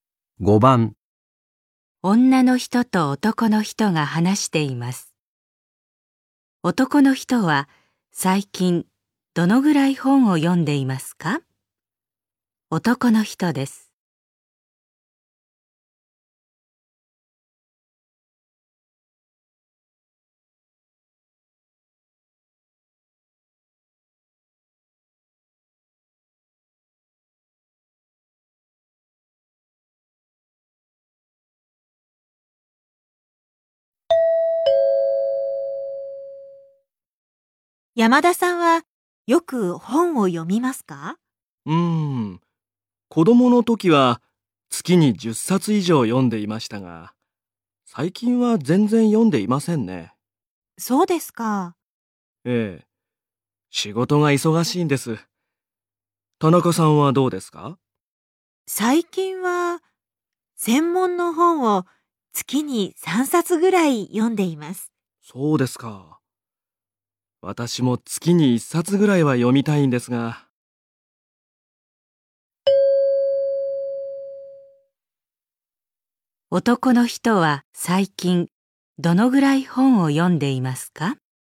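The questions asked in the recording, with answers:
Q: 男の人は最近どのぐらい本を読んでいますか?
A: 全然読んでいない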